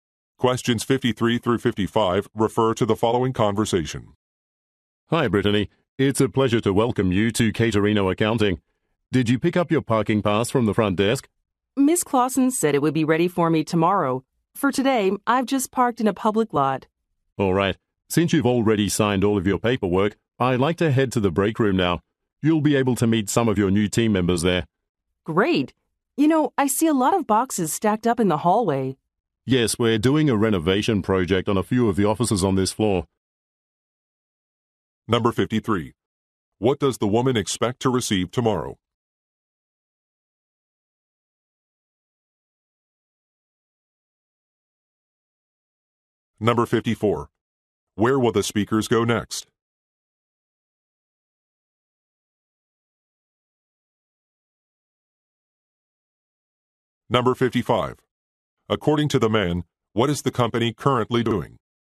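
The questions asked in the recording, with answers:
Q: What does the woman expect to receive tomorrow?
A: A parking pass

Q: Where will the speakers go next?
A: The break room

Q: According to the man, what is the company currently doing?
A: Renovating some offices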